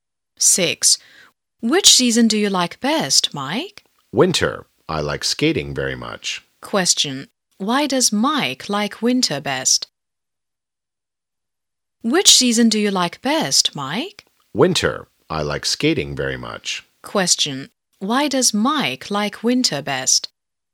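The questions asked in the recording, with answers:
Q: Why does Mike like winter best?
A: He likes skating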